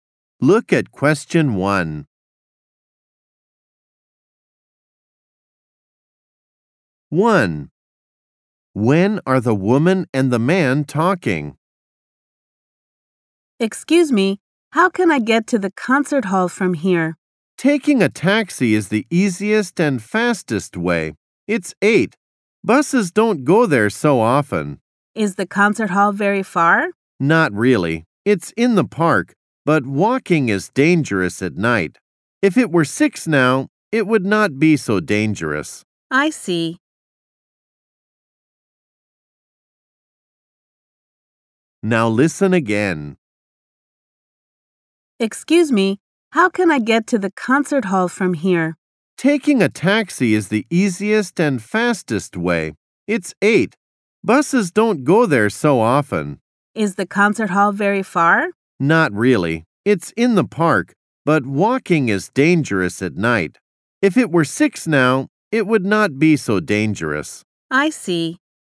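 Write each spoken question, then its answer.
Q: When are the woman and the man talking?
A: At 8 o'clock at night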